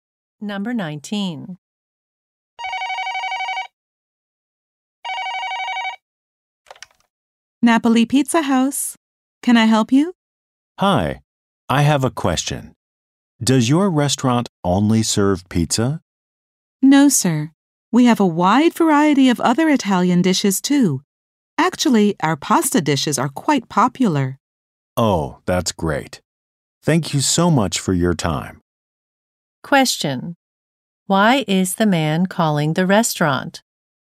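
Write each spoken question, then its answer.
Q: Why is the man calling the restaurant?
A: To ask whether it serves only pizza.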